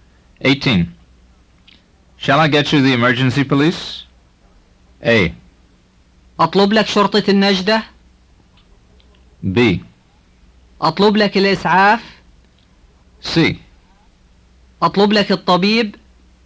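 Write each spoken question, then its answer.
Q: Shall I get you the emergency police?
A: A: أطلب لك شرطة النجدة؟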